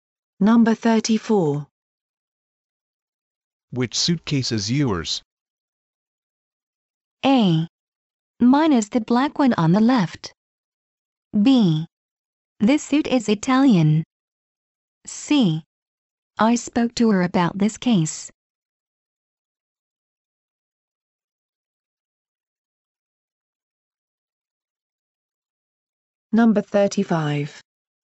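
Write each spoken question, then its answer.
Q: Which suitcase is yours?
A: A: Mine is the black one on the left.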